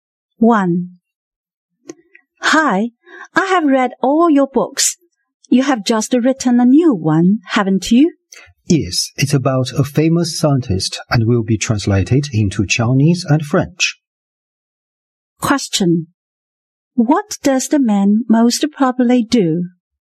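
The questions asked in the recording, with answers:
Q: What does the man most probably do?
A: He is a writer.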